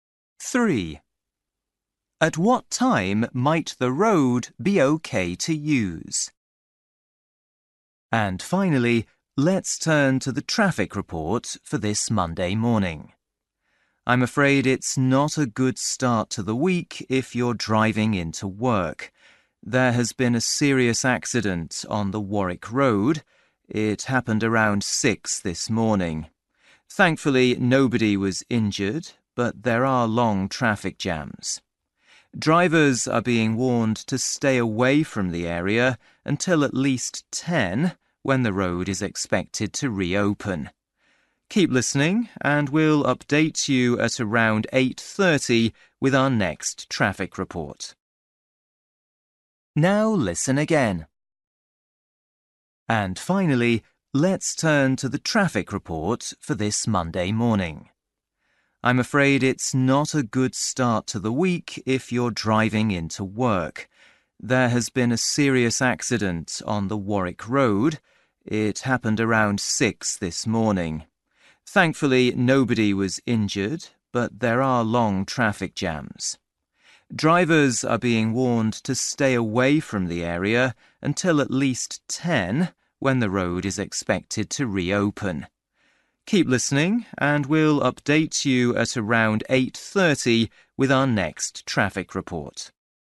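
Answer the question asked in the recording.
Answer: 10 o'clock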